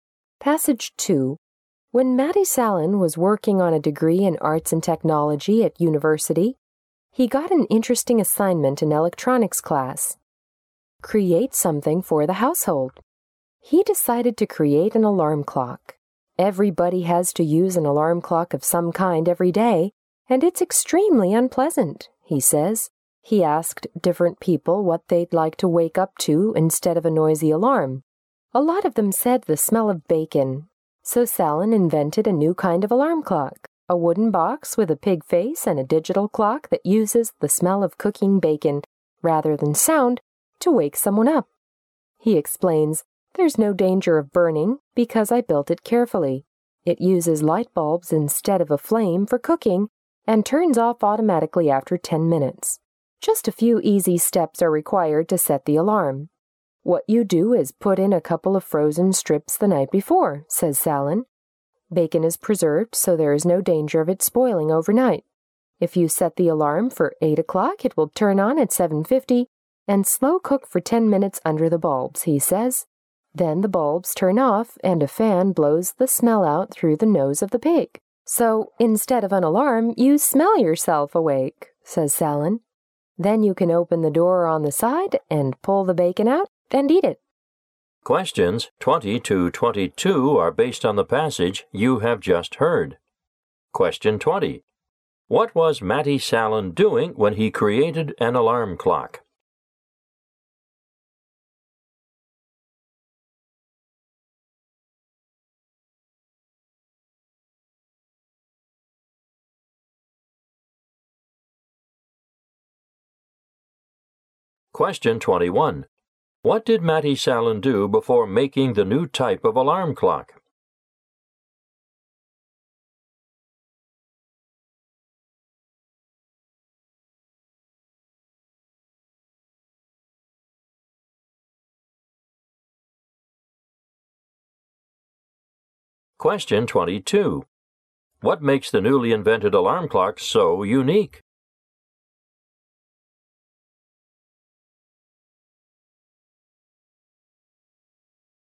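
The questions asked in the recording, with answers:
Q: What was Matti Salen doing when he created an alarm clock?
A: Working on a university degree (an electronics class assignment)

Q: What did Matti Salen do before making the new type of alarm clock?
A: He asked people what they'd like to wake up to.

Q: What makes the newly invented alarm clock so unique?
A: It wakes people with the smell of cooking bacon.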